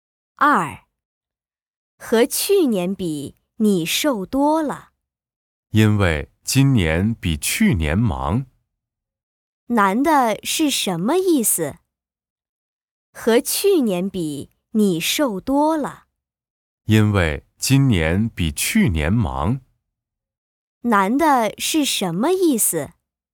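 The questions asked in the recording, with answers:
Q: 男的是什么意思?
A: 今年比去年忙,所以瘦了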